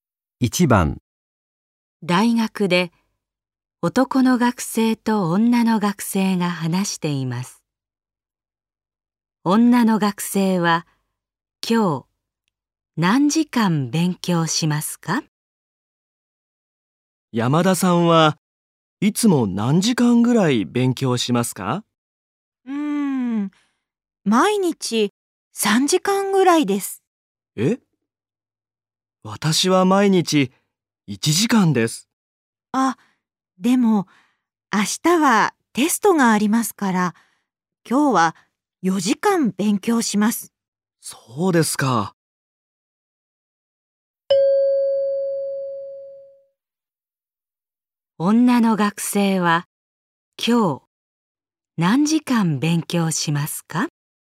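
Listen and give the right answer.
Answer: 4時間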